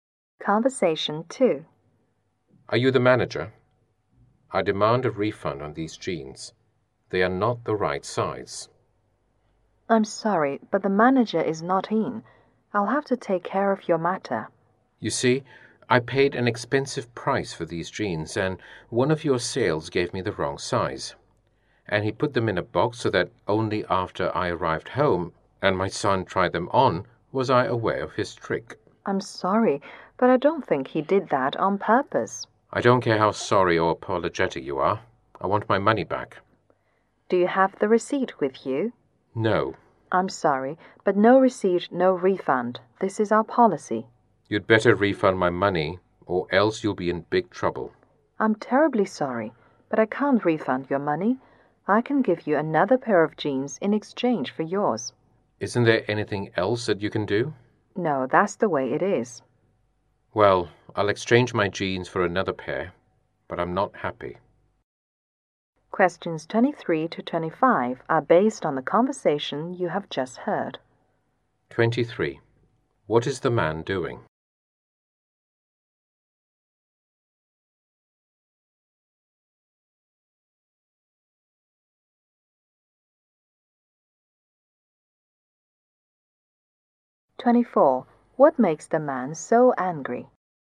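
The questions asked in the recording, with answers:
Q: What is the man doing?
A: Demanding a refund for jeans

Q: What makes the man so angry?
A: He was sold jeans of the wrong size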